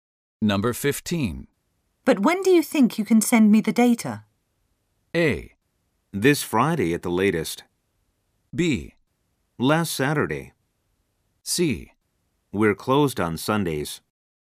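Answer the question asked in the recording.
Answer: A: This Friday at the latest.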